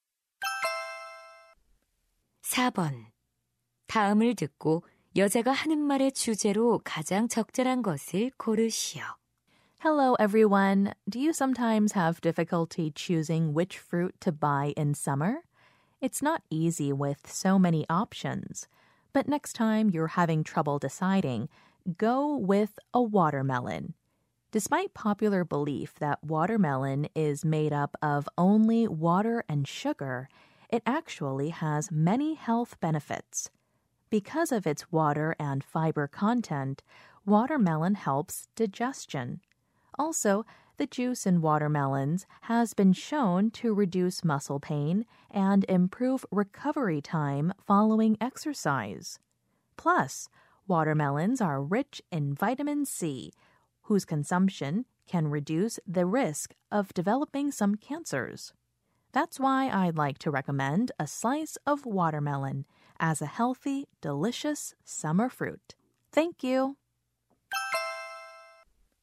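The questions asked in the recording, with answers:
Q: 다음을 듣고 여자가 하는 말의 주제로 가장 적절한 것을 고르시오.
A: 수박의 건강상 이점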